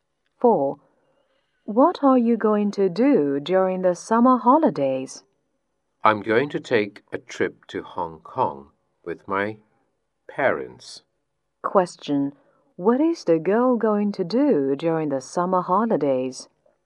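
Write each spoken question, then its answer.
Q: Question. What is the girl going to do during the summer holidays?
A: Take a trip to Hong Kong with her parents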